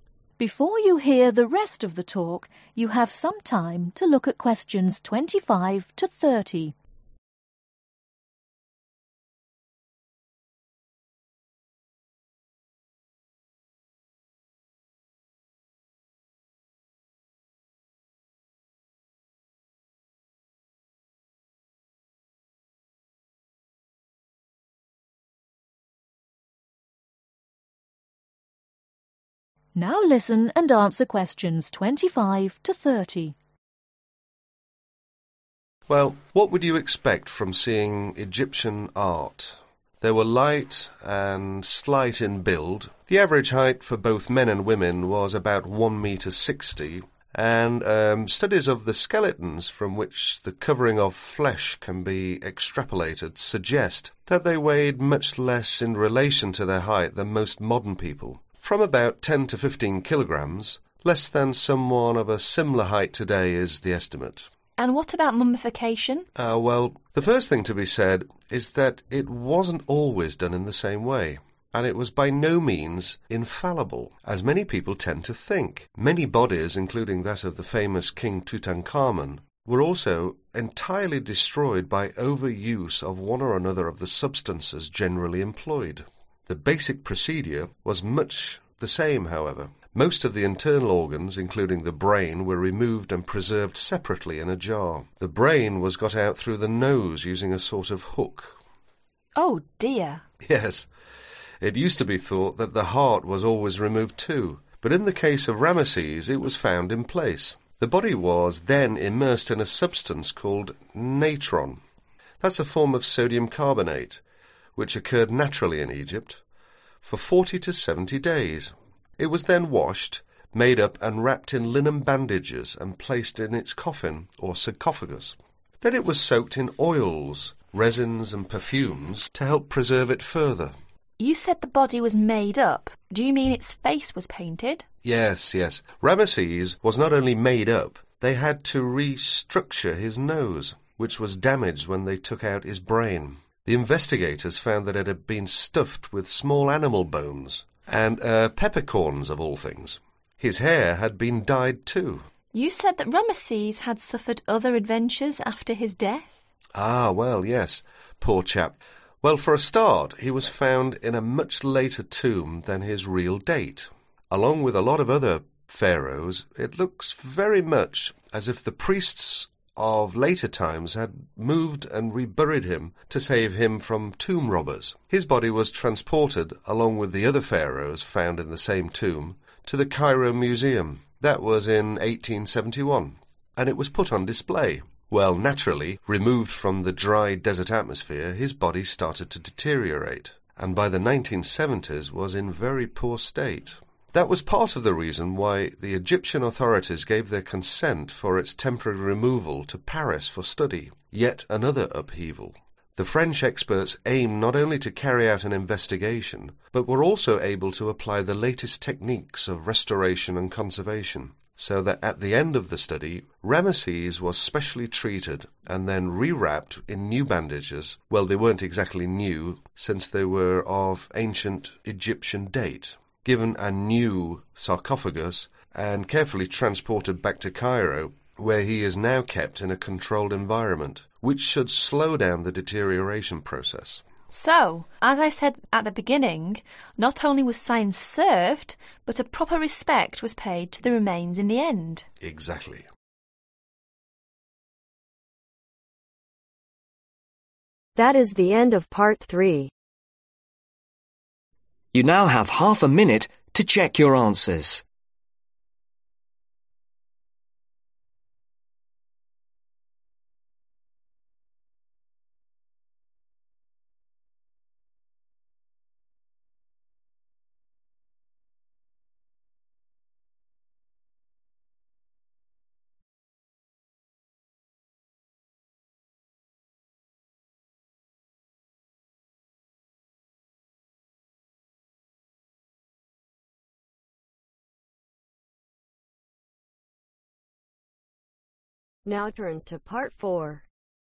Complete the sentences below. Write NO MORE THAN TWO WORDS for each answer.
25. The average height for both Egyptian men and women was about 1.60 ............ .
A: Meters

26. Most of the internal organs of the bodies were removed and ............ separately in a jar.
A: Preserved

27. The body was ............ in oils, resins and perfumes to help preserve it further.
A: Soaked

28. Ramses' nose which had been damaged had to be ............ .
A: Restructured

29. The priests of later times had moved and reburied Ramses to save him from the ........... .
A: Tomb robbers

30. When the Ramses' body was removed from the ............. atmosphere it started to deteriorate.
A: Dry desert